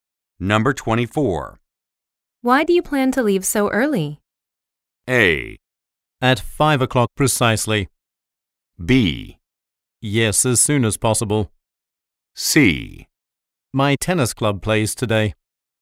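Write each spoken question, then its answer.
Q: Why do you plan to leave so early?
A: C: My tennis club plays today.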